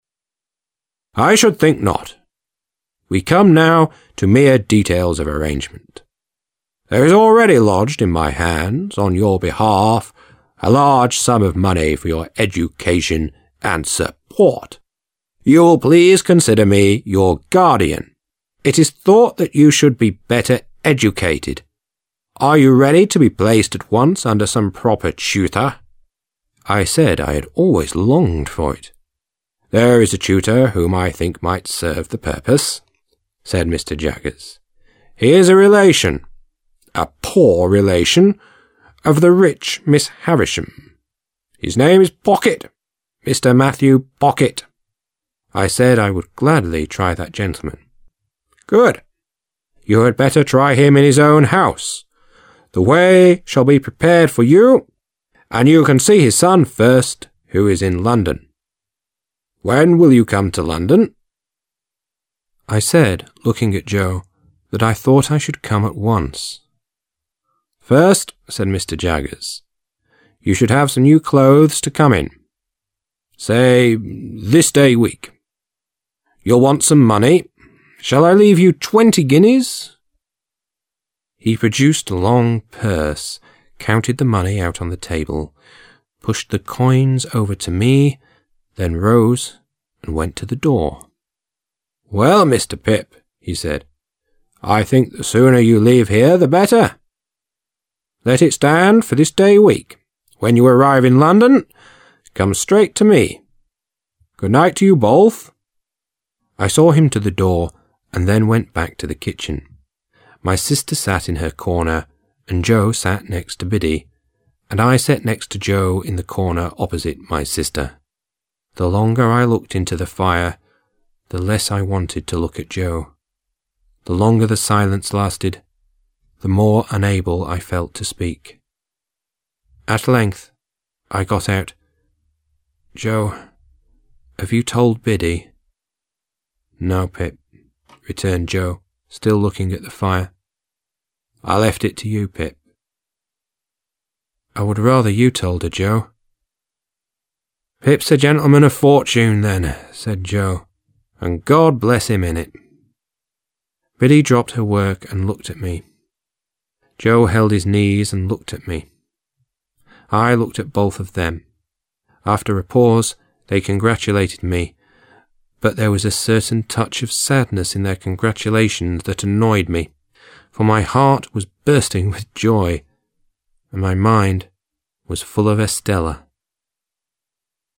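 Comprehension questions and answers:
Task 2. Listen to the track 7_02 and decide which of the statements are true (T) and which are false (F).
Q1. Pip got a pittance from his benefactor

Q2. Pip was ready to be placed at once under some proper tutor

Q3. Pip refused to try the gentleman as a tutor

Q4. Pip was going to see his tutor's daughter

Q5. Mr Jaggers said that Pip should have some new clothes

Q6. Mr Jaggers has left Pip twenty five guineas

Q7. Mr Jaggers told Pip to come straight to his tutor as soon as he were in London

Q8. It was Joe who told Biddy about Pip's leaving to London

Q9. There was not a touch of sadness in Joe and Biddy's congratulations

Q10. Pip's mind was full of Estella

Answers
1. F
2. T
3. F
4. F
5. T
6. F
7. F
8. F
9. F
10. T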